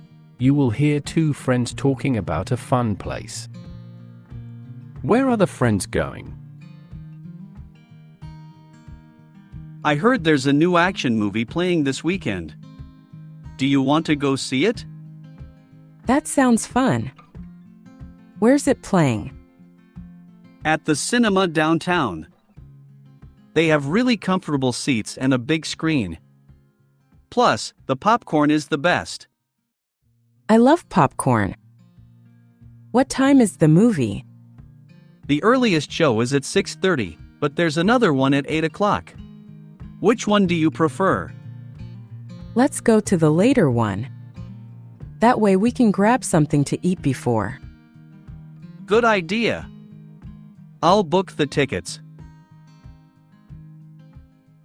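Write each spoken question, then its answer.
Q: Where are the friends going?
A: the cinema downtown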